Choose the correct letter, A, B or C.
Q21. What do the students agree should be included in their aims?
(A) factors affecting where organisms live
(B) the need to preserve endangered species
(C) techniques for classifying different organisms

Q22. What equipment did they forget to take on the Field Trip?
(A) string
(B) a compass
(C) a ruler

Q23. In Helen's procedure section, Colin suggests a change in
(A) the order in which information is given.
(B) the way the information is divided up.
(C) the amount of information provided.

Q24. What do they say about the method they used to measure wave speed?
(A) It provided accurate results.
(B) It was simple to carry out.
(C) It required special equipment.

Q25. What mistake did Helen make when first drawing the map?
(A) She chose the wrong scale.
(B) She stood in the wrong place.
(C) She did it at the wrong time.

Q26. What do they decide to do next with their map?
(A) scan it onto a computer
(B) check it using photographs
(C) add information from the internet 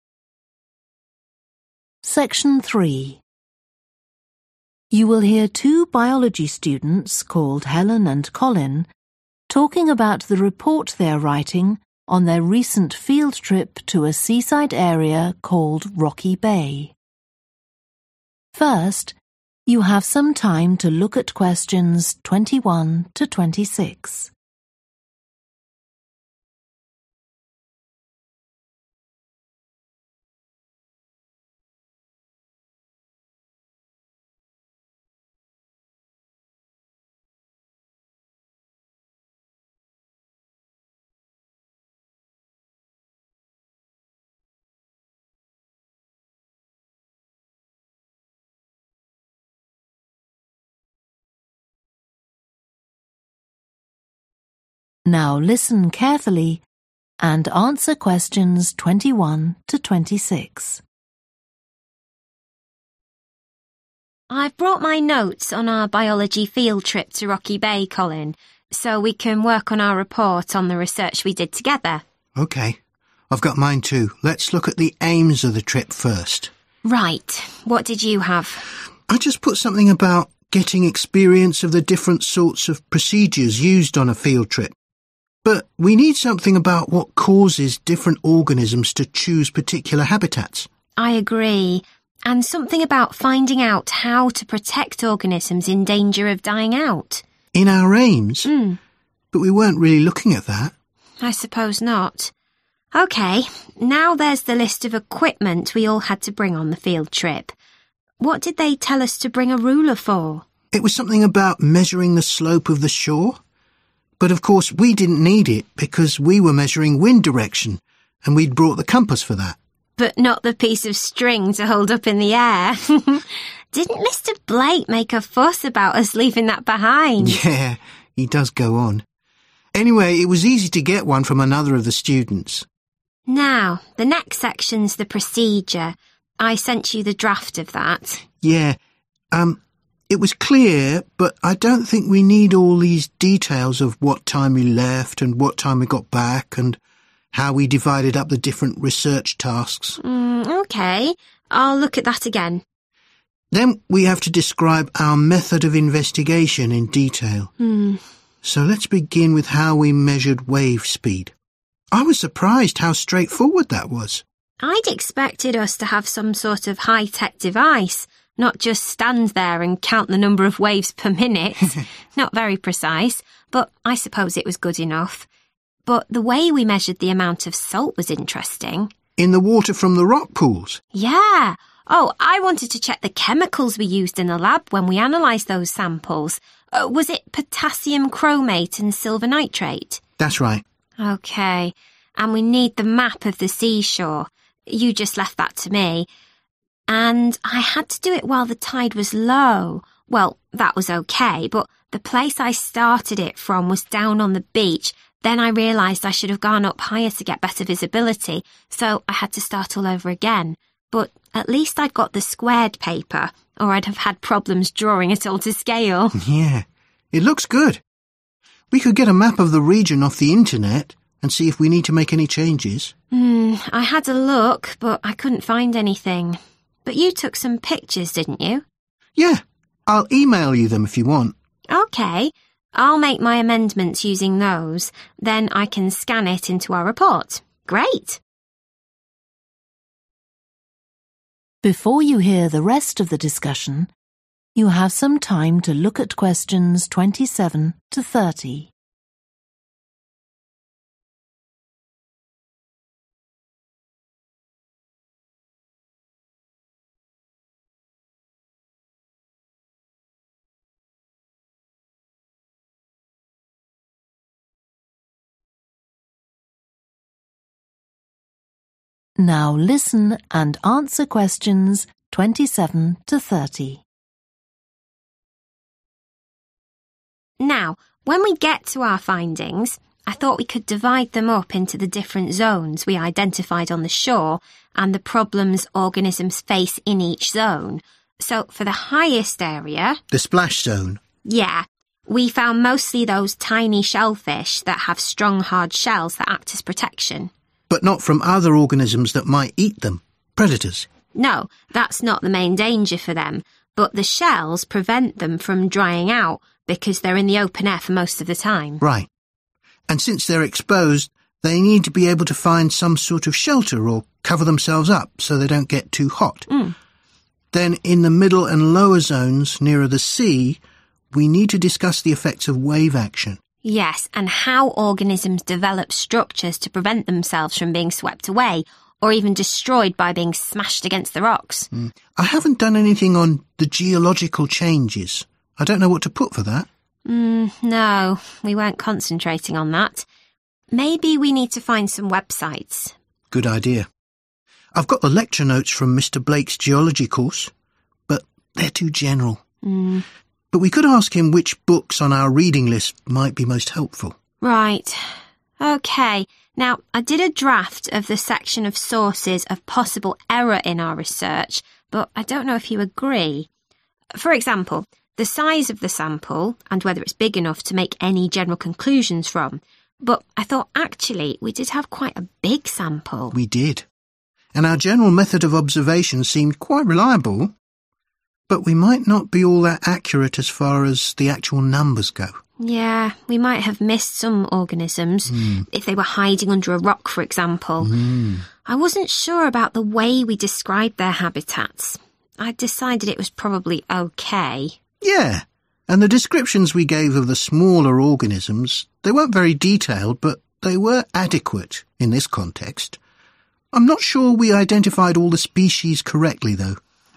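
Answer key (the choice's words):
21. factors affecting where organisms live
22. string
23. the amount of information provided.
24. It was simple to carry out.
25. She stood in the wrong place.
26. check it using photographs

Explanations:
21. COLIN: I just put something about getting experience of the different sorts of procedures used on a field trip. But we need something about what causes different organisms to choose particular habitats. (chúng ta cần biết về nguyên nhân khiến các sinh vật khác nhau chọn một môi trường sống cụ thể) HELEN: I agree. (Tôi đồng ý)
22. But not the piece of string to hold up in the air! Didn't Mr Blake make a fuss about us leaving that behind? (Nhưng không phải là đoạn dây để giữ trên không! Chẳng phải ông Blake đã làm ầm lên về việc chúng ta để quên nó hay sao?)
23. Yeah. It was clear, but I don't think we need all these details of what time we left and what time we got back and how we divided up the different research tasks. 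(Tôi không nghĩ rằng chúng ta cần tất cả những thông tin chi tiết về thời điểm rời đi và trở lại, và cả cách chúng ta chia các nhiệm vụ nghiên cứu khác nhau)
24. Then we have to describe our method of investigation in detail. So let's begin with how we measured wave speed. I was surprised how straightforward that was. (Hãy bắt đầu với cách chúng ta đo lường tốc độ của sóng. Tôi khá bất ngờ là nó lại dễ như vậy)
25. And I had to do in while the tide was low, well that was OK, but the place I started it from was down on the beach, then I realised I should have gone up higher to get better visibility (nơi tôi bắt đầu vẽ là ở bãi biển, sau đó tôi nhận ra rằng tôi nên đi lên cao hơn để có tầm nhìn tốt hơn)
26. HELEN: I had a look but I couldn't find anything. But you took some pictures, didn't you? (Nhưng bạn đã chụp được vài tấm hình nhỉ?) COLIN: Yeah. I'll email you them if you want. HELEN: OK. 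I'll make my amendments using those, then I can scan it into our report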